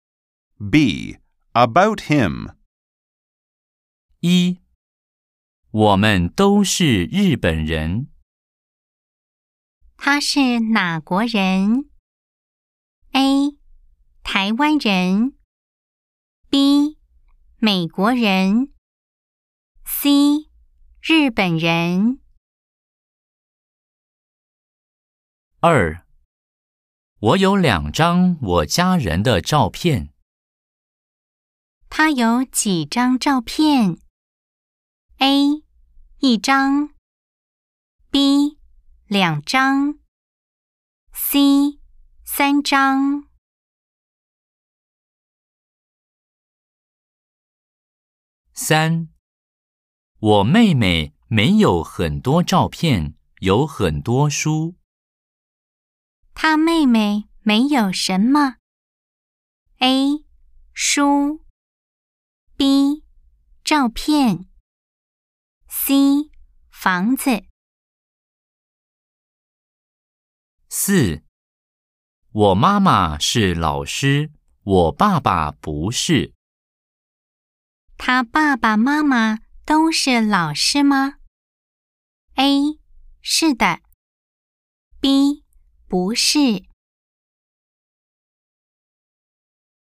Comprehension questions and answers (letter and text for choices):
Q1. 我們都是日本人。他是哪國人?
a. 臺灣人 Táiwān rén Người Đài Loan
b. 美國人 Měiguó rén Người Mỹ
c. 日本人 Rìběn rén Người Nhật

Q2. 我有兩張我家人的照片。他有幾張照片?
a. 一張 yì zhāng một tấm / một chiếc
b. 兩張 liǎng zhāng hai tấm / hai chiếc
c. 三張 sān zhāng ba tấm / ba chiếc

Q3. 我妹妹沒有很多照片,有很多書。他妹妹沒有什麼?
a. 書 shū sách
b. 照片 zhàopiàn ảnh / tấm ảnh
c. 房子 fángzi ngôi nhà / căn nhà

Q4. 我媽媽是老師,我爸爸不是。他爸爸媽媽都是老師嗎?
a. 是 shì là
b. 不是 bú shì không phải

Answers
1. c. 日本人 Rìběn rén Người Nhật
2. b. 兩張 liǎng zhāng hai tấm / hai chiếc
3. b. 照片 zhàopiàn ảnh / tấm ảnh
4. b. 不是 bú shì không phải